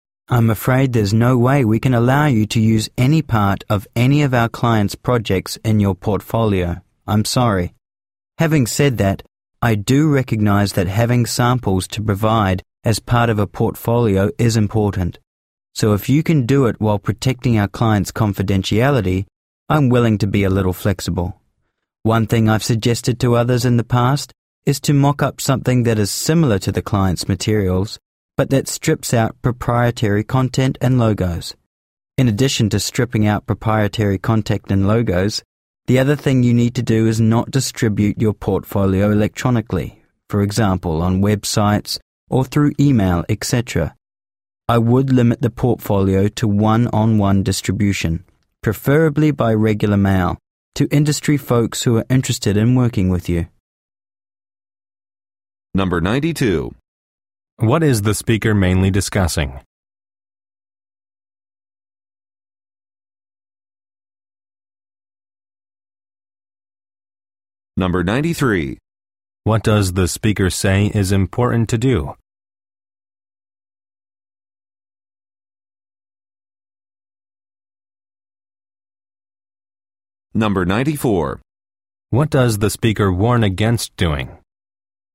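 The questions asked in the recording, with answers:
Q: What is the speaker mainly discussing?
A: Using client project materials in a portfolio

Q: What does the speaker warn against doing?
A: Distributing the portfolio electronically, such as on websites or by email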